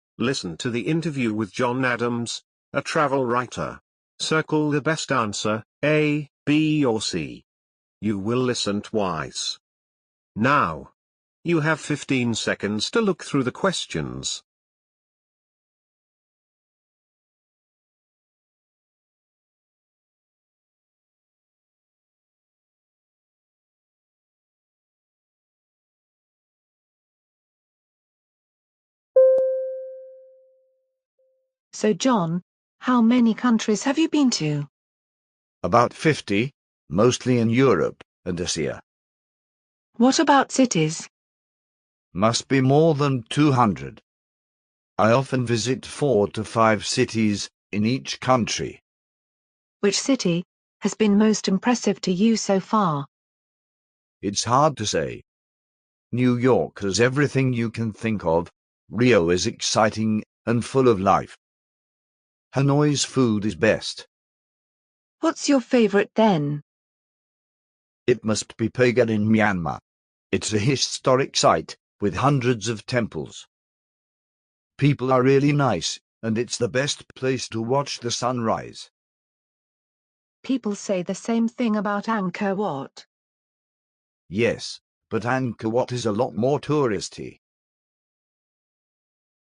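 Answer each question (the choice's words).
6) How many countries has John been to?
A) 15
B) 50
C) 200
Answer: 50

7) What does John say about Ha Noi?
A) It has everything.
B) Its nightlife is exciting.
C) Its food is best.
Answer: Its food is best.

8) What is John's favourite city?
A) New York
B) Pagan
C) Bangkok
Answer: Pagan

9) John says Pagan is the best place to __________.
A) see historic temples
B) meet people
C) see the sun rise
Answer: see the sun rise

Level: Môn thi: TIẾNG ANH 7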